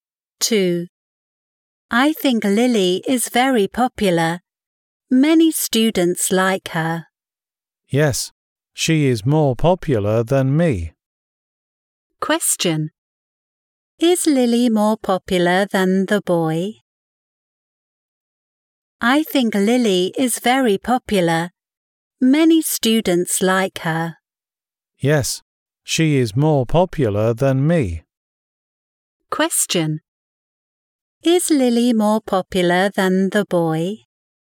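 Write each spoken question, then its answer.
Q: Is Lily more popular than the boy?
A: Yes, she is.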